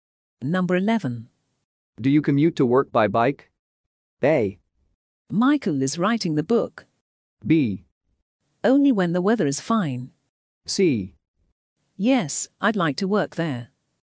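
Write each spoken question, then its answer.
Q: Do you commute to work by bike?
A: B: Only when the weather is fine.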